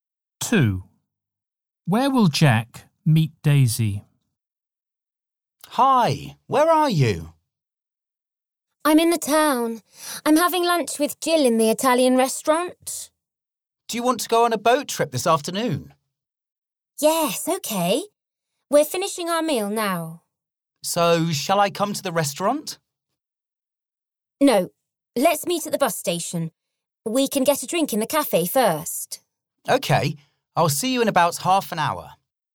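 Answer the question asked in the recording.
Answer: At the bus station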